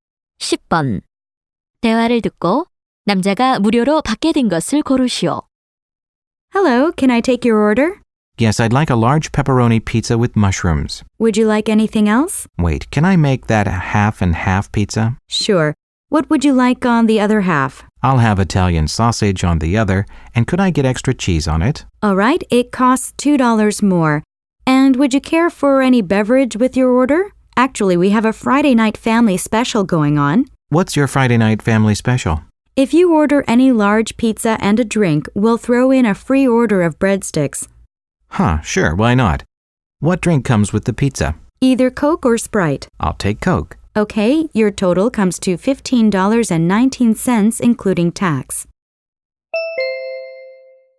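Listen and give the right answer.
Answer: 브레드스틱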